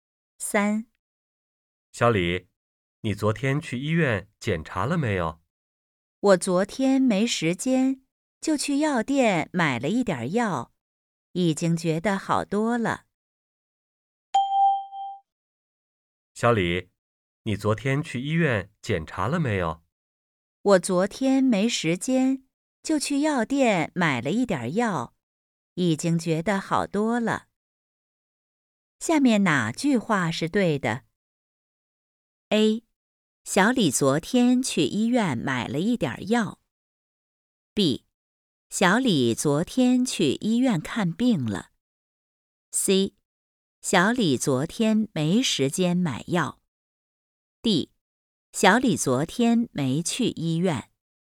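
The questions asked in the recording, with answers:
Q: 下面哪句话是对的?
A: D: 小李昨天没去医院。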